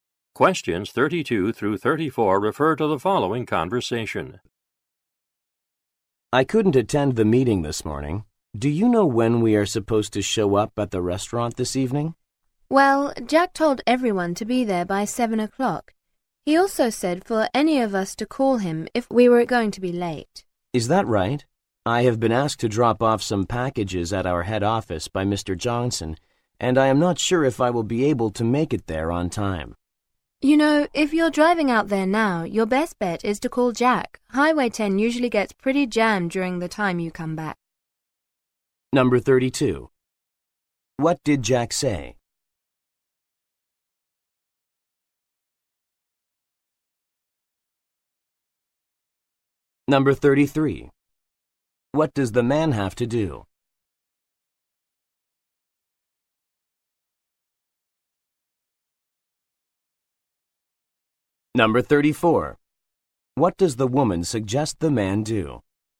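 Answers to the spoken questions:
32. Be at the restaurant by 7 and call him if late
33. Drop off packages at the head office
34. Call Jack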